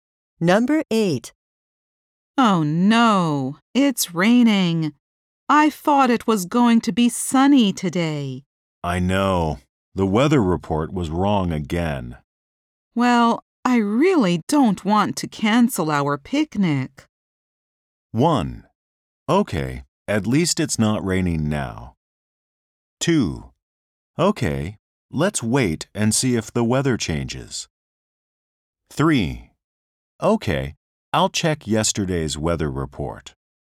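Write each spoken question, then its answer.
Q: Well, I really don't want to cancel our picnic.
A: 2: Okay, let's wait and see if the weather changes.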